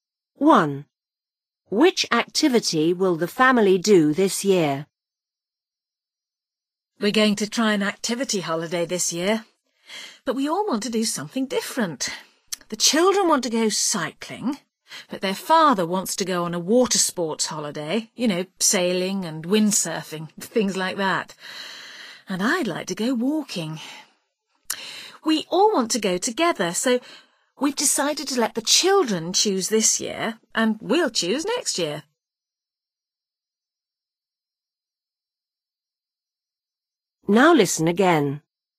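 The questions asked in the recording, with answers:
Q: Which activity will the family do this year?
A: cycling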